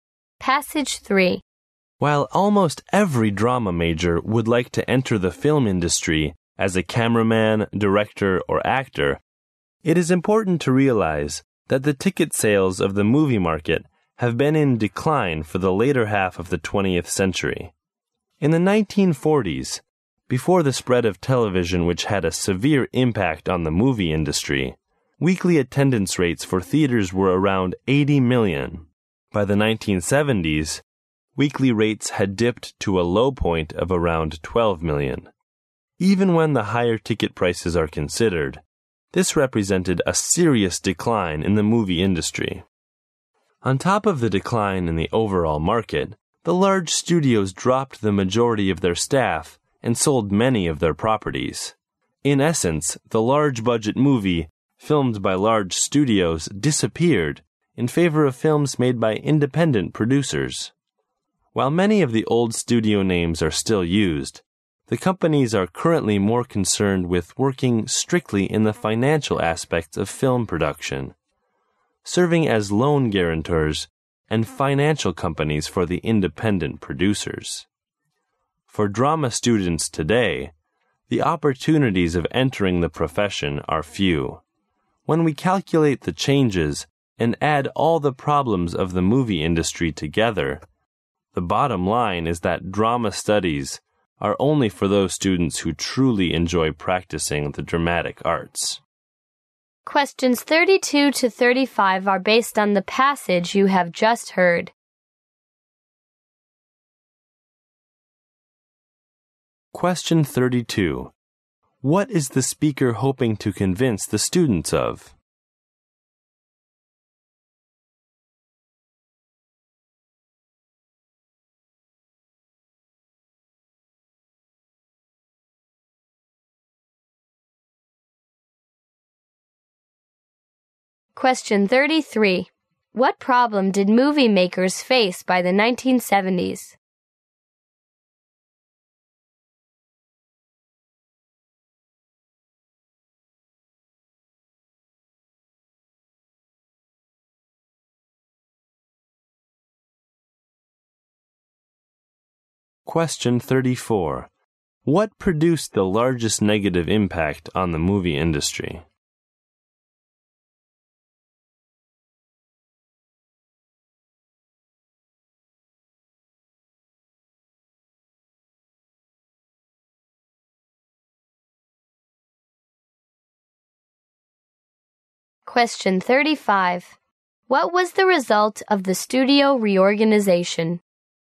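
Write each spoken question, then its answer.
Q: What is the speaker hoping to convince the students of?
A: There are few jobs in film, so study drama only if you truly enjoy it.

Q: What problem did movie makers face by the 1970s?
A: Weekly attendance fell to about 12 million.

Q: What produced the largest negative impact on the movie industry?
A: The spread of television

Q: What was the result of the studio reorganization?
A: Big-budget studio films gave way to films by independent producers.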